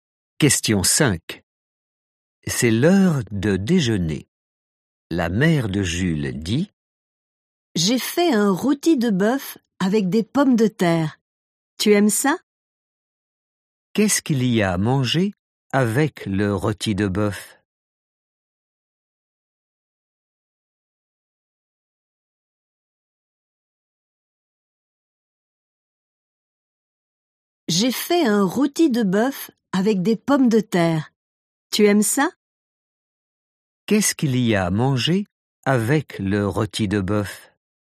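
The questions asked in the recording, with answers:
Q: Qu'est-ce qu'il y a à manger avec le rôti de bœuf?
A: des pommes de terre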